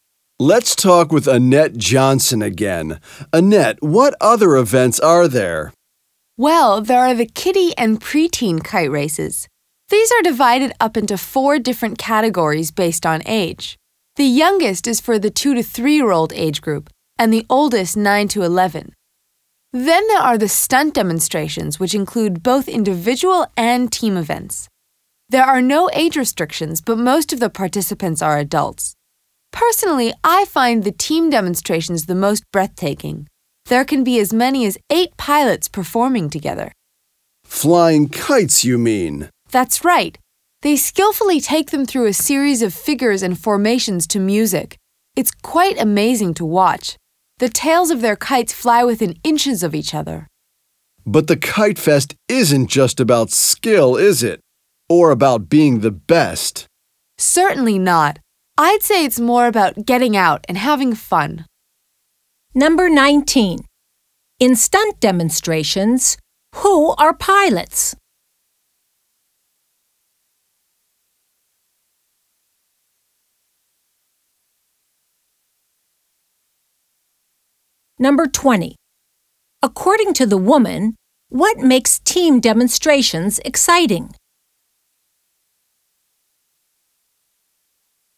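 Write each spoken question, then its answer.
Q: In stunt demonstrations, who are pilots?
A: The people flying the kites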